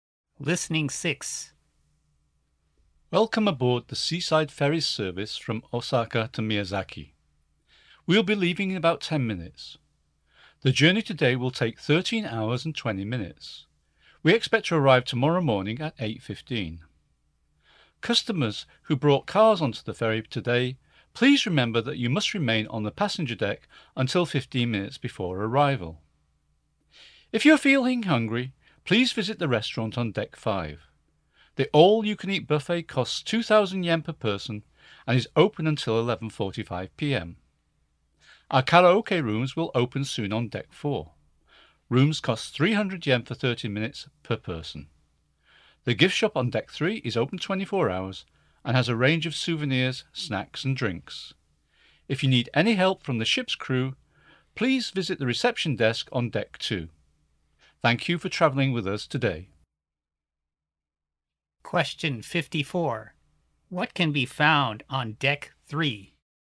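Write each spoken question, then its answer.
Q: What can be found on Deck 3?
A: The gift shop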